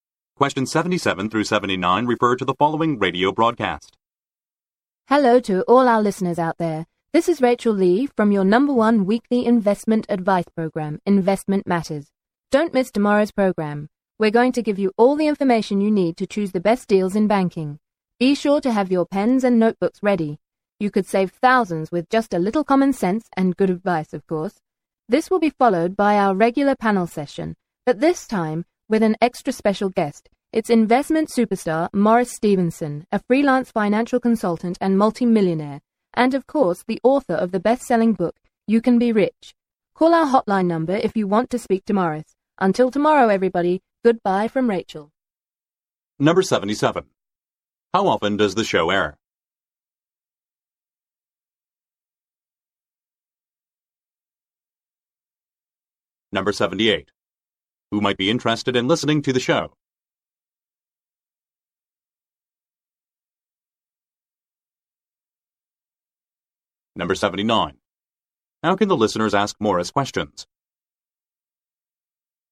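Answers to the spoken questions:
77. Weekly
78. People interested in investment and banking deals
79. By calling the hotline number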